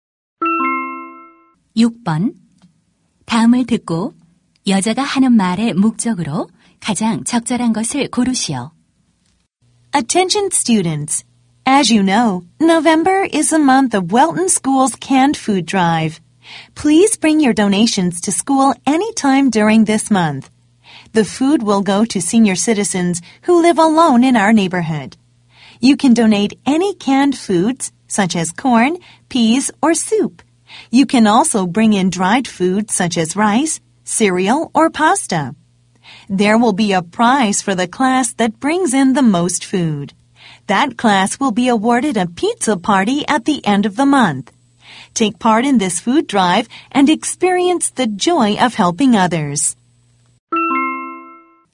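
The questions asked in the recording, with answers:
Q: 다음을 듣고 여자가 하는 말의 목적으로 가장 적절한 것을 고르시오.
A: 통조림 음식 기부 행사 참여 독려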